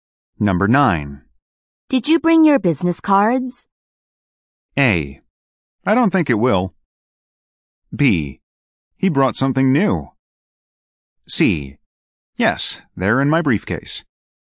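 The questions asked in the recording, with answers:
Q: Did you bring your business cards?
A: C: Yes, they're in my briefcase.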